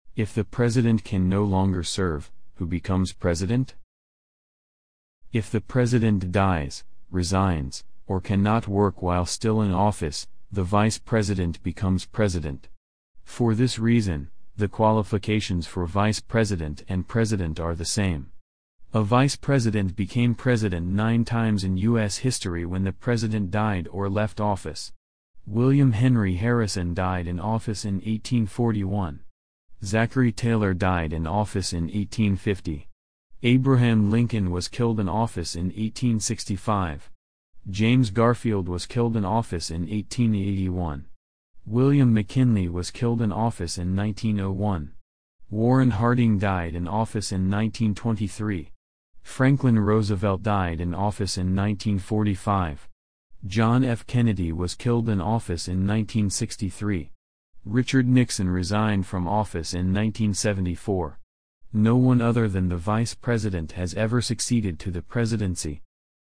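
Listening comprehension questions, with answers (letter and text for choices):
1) If the President can no longer serve, who becomes President?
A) Secretary of defense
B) The Speaker of the United States House of Representatives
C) The Vice President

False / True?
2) True or false: the qualifications for vice president and president are not the same.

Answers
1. C) The Vice President
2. False

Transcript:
If the president dies, resigns, or cannot work while still in office, the vice president becomes president. For this reason, the qualifications for vice president and president are the same. A vice president became president nine times in U.S. history when the president died or left office. William Henry Harrison died in office in 1841. Zachary Taylor died in office in 1850. Abraham Lincoln was killed in office in 1865. James Garfield was killed in office in 1881. William McKinley was killed in office in 1901. 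Warren Harding died in office in 1923. Franklin Roosevelt died in office in 1945. John F. Richard Nixon resigned from office in 1974. No one other than the vice president has ever succeeded to the presidency.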